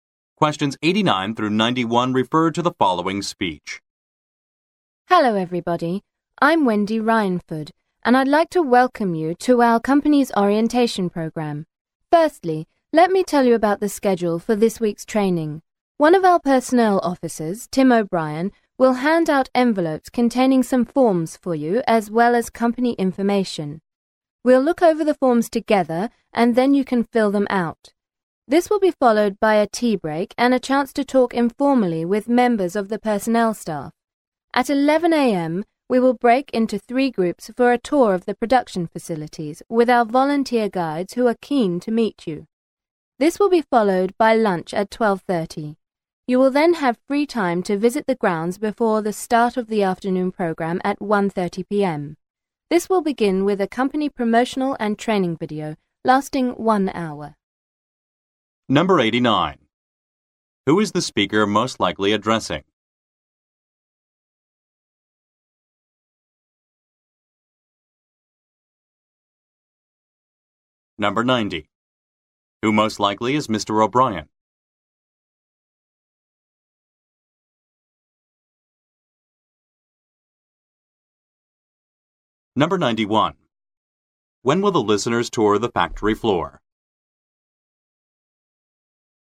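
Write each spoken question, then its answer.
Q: Who is the speaker most likely addressing?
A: New employees

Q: Who most likely is Mr.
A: A personnel officer

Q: O'Brien? Number 91. When will the listeners tour the factory floor?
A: At 11 a.m.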